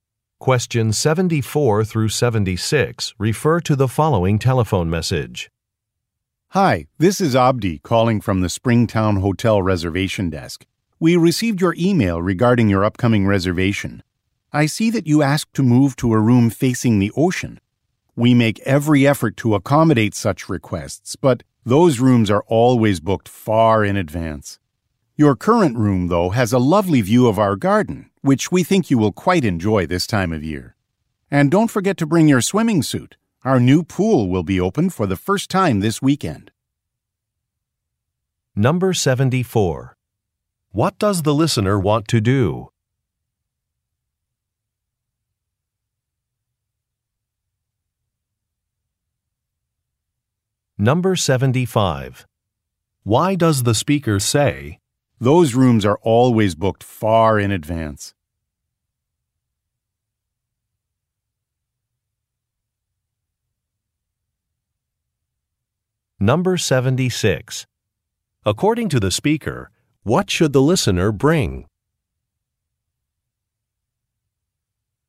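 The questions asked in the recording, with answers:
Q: What does the listener want to do?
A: Move to a room facing the ocean

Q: "Those rooms are always booked far in advance"?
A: To say the request cannot be accommodated

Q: According to the speaker, what should the listener bring?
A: A swimming suit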